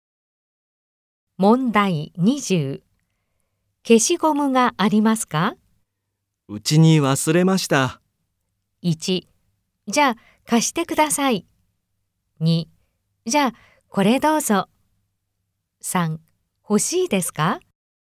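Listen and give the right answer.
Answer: 2: じゃあこれどうぞ。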